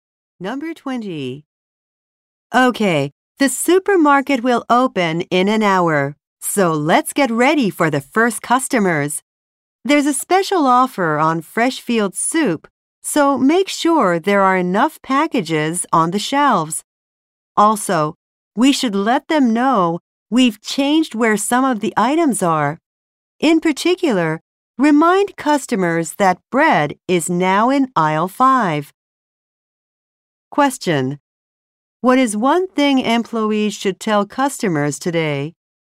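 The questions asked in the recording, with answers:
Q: What is one thing employees should tell customers today?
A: Bread is now in aisle 5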